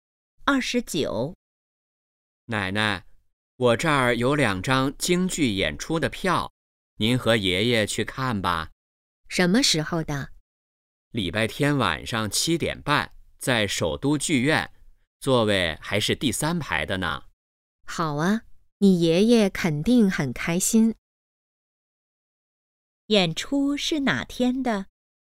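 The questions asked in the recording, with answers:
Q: 演出是哪天的?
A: 礼拜天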